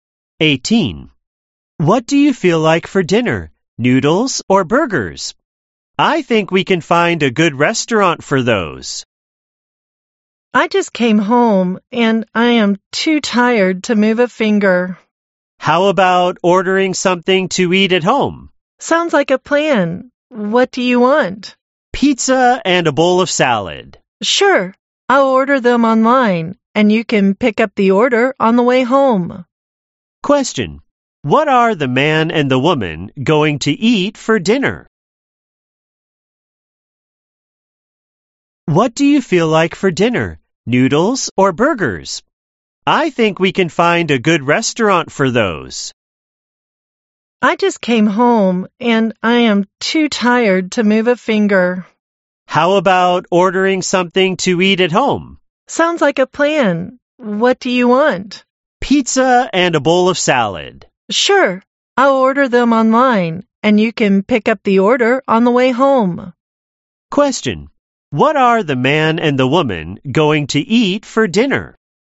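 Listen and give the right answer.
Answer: Pizza and salad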